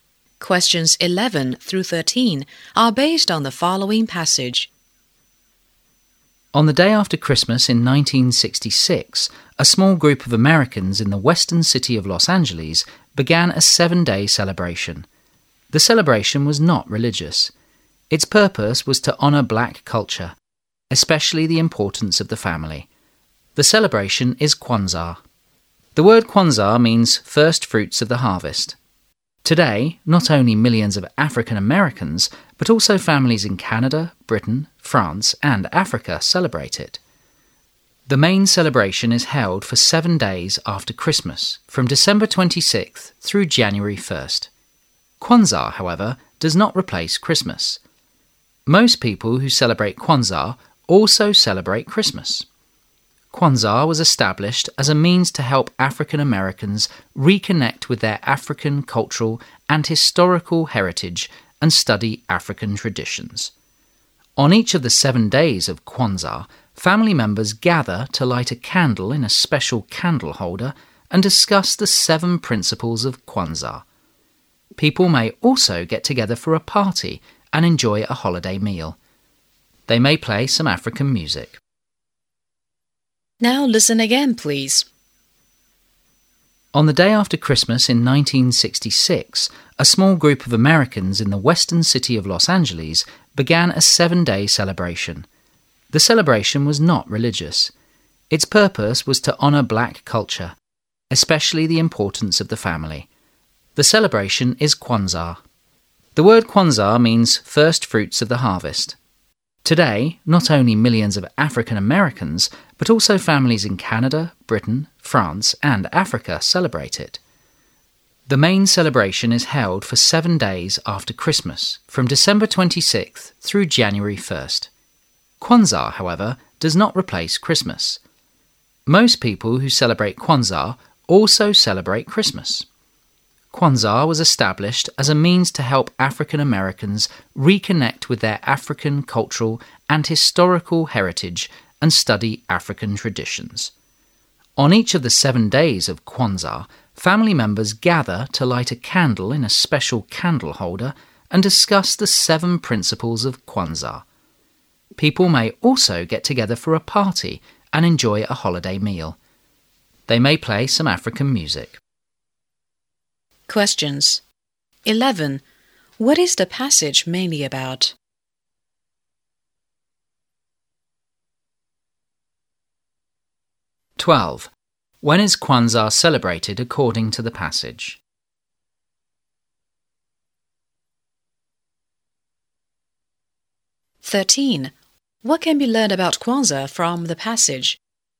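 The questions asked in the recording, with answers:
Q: What is the passage mainly about?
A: Kwanzaa, a celebration of black culture

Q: When is Kwanzaa celebrated according to the passage?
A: For 7 days after Christmas, from December 26 to January 1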